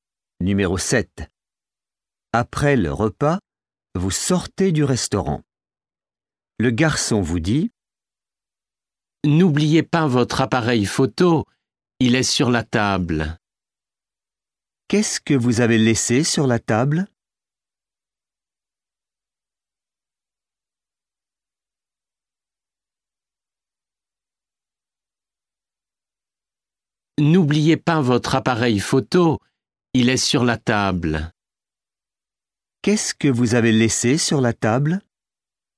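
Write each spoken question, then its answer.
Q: Qu'est-ce que vous avez laissé sur la table?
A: L'appareil photo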